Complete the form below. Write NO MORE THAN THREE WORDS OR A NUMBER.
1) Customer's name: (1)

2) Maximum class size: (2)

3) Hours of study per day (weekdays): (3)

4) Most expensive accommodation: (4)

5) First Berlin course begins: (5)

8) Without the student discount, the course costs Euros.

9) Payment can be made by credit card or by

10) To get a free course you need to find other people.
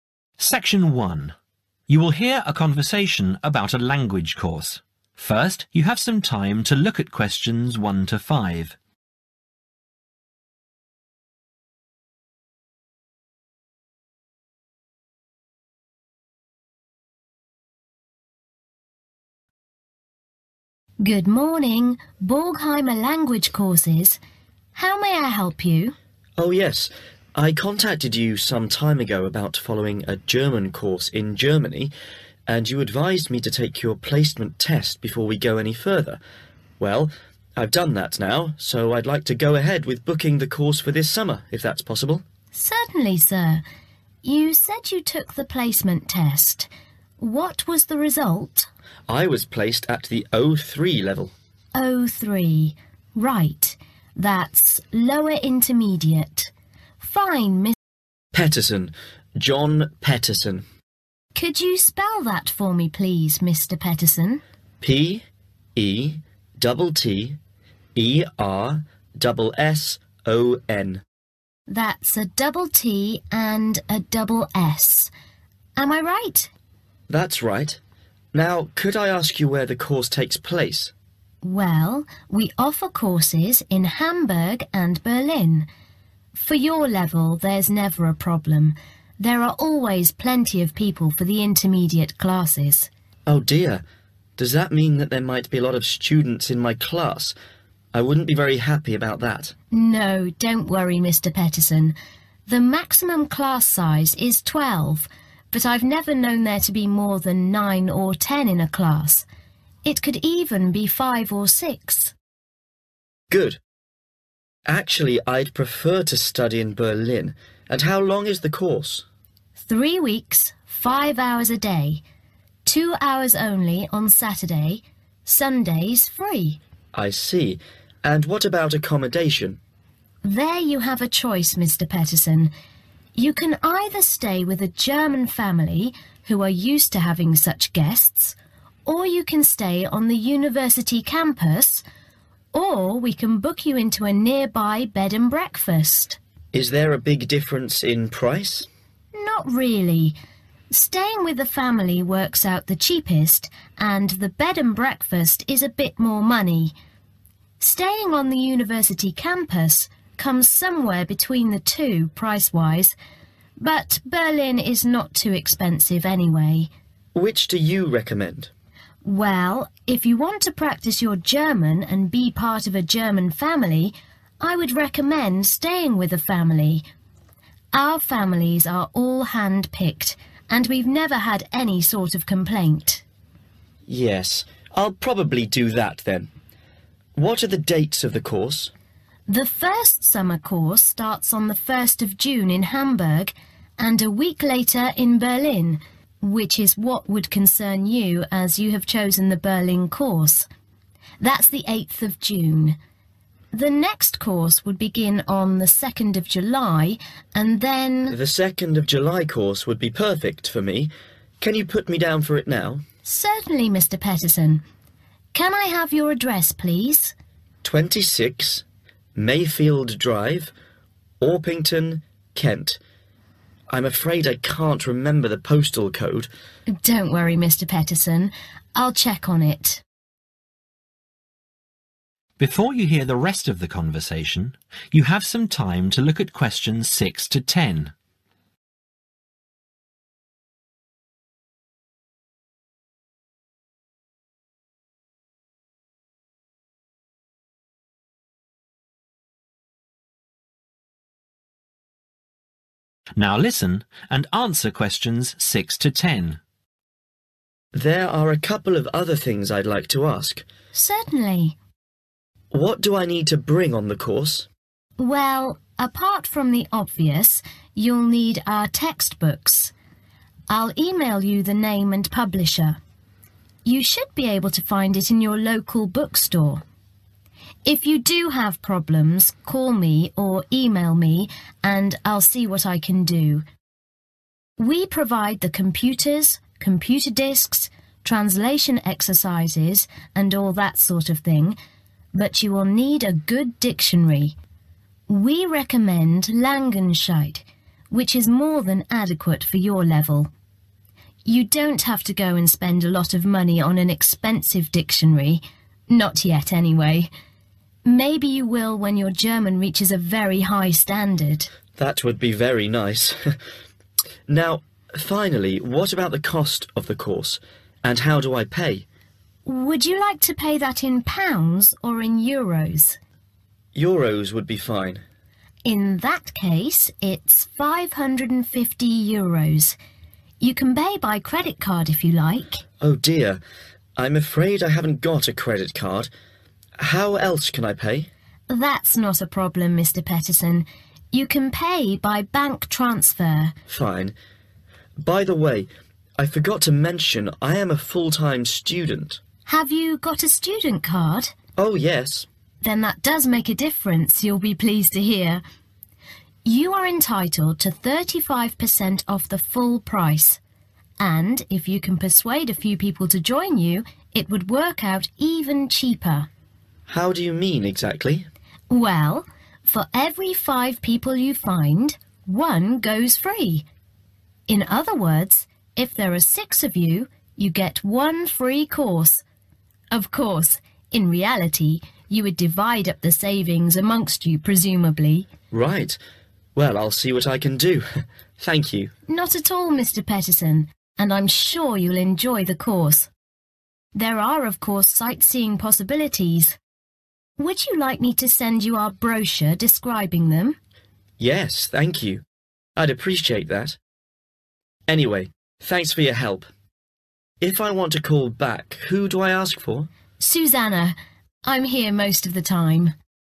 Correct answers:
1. John Petterson
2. 12
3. 5
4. bed and breakfast
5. 8 June
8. 550
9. bank transfer
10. five